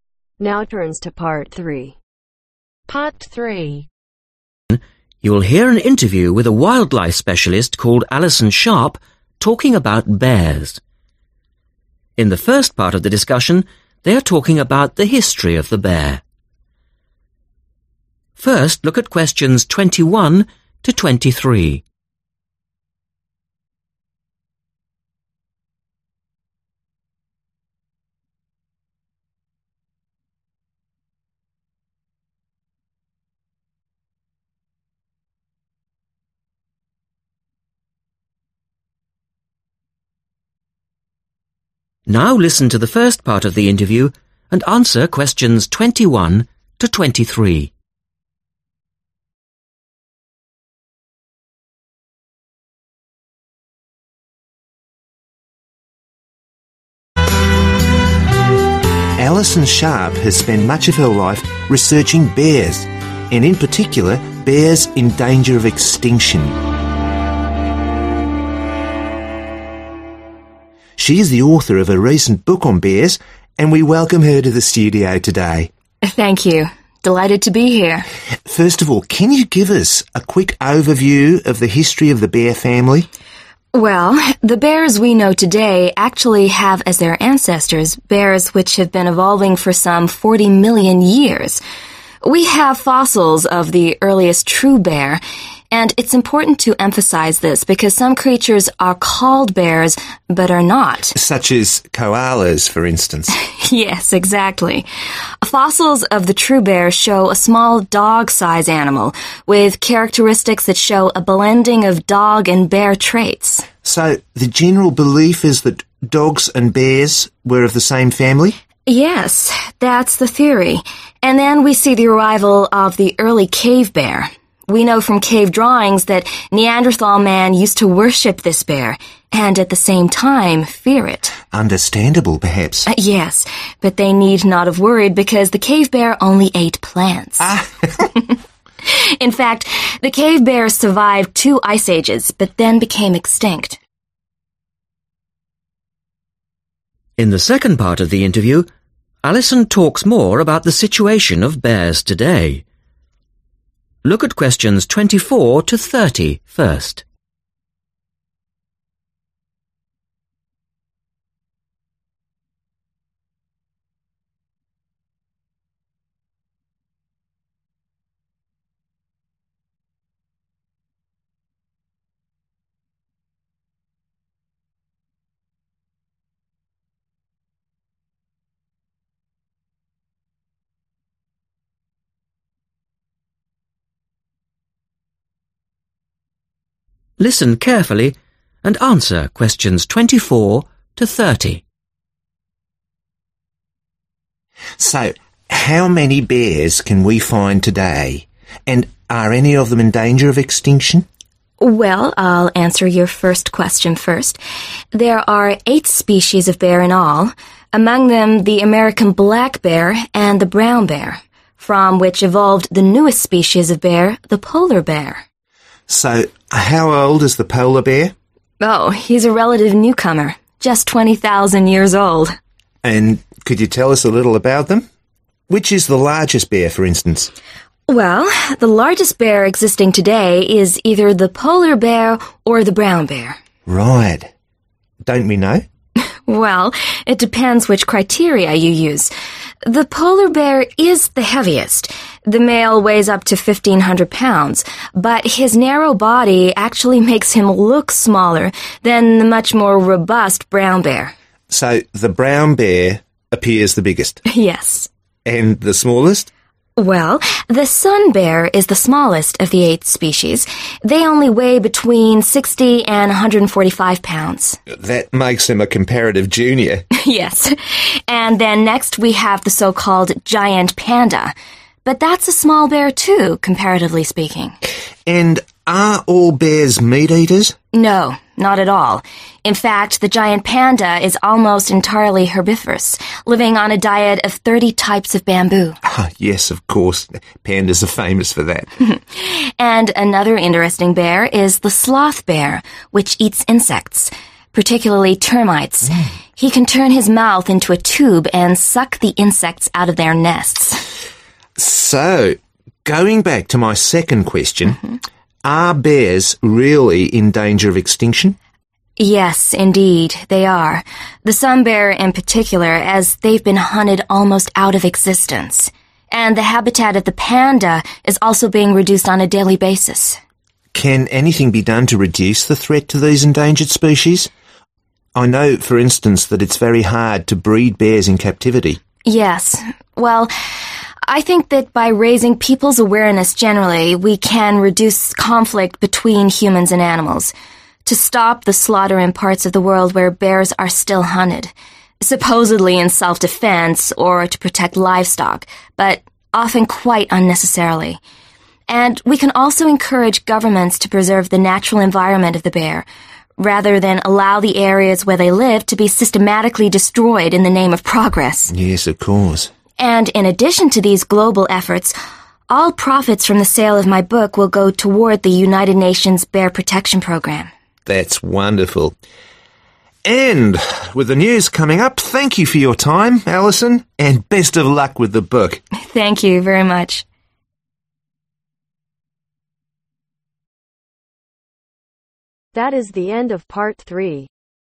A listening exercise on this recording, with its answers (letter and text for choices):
Write NO MORE THAN THREE WORDS for each answer.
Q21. Bear ancestors date back ............ years.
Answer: 40 Million

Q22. Scientists think bears ere originally in the same family as ............ .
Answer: Dogs/the dog

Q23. the Cave Bear was not dangerous because it ............ .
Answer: Only ate plants

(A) Sloth Bear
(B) Giant Panda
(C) Polar Bear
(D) Black Bear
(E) Brown Bear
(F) Sun Bear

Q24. Which is the most recent species ?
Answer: (C) Polar Bear

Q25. Which is the largest looking bear ?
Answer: (E) Brown Bear

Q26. Which is the smallest bear ?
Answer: (F) Sun Bear

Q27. Which bear eats plants ?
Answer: (B) Giant Panda

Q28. Which bear eats insects ?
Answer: (A) Sloth Bear